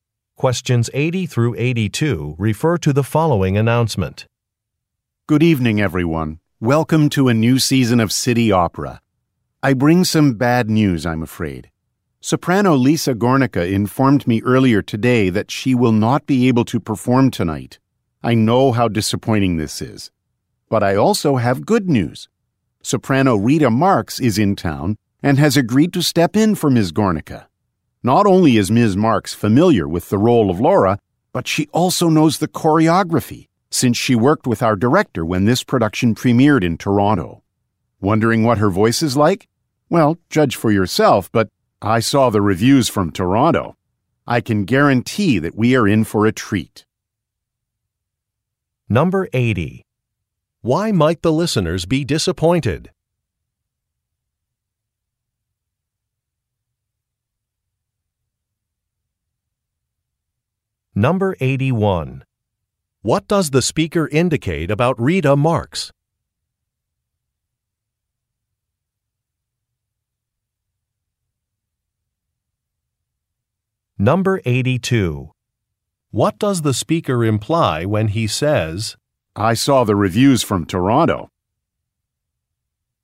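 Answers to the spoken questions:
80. A singer, Lisa Gornica, cannot perform tonight
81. She has worked with the director before and knows the role
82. Rita Marx is an excellent singer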